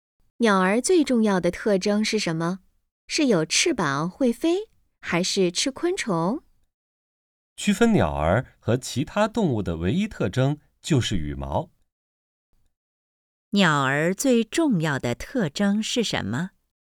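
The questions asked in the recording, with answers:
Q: 鸟儿最重要的特征是什么?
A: 有羽毛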